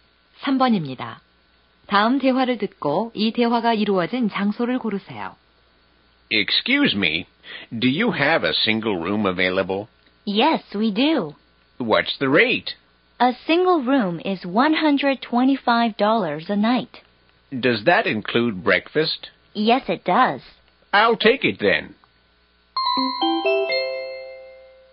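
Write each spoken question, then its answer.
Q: 다음 대화를 듣고 이 대화가 이루어진 장소를 고르세요.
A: 호텔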